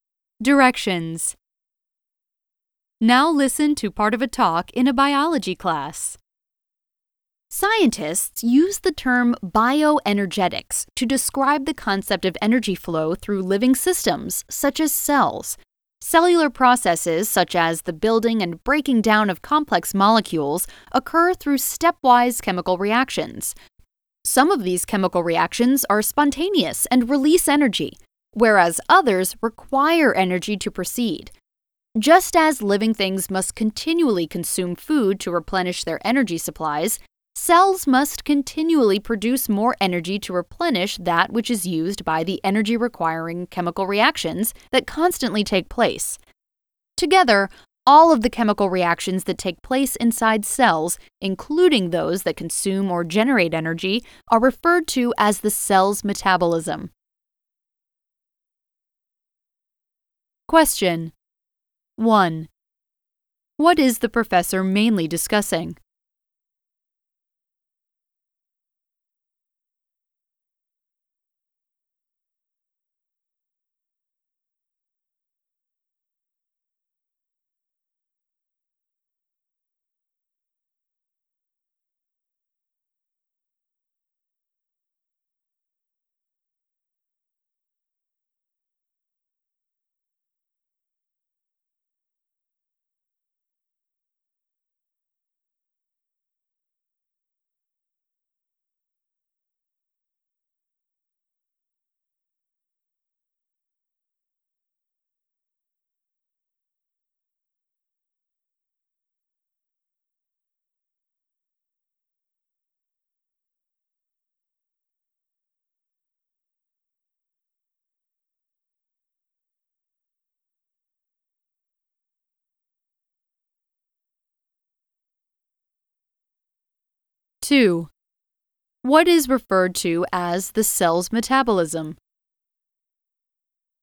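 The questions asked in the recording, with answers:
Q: What is the professor mainly discussing?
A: Bioenergetics: how energy flows through living systems such as cells

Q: What is referred to as the cell's metabolism?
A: All of the chemical reactions that take place inside cells, including those that consume or generate energy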